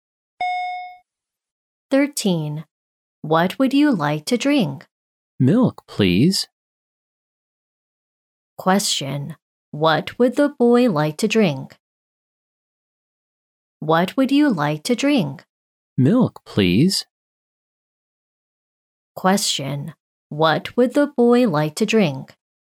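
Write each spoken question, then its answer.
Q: What would the boy like to drink?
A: Milk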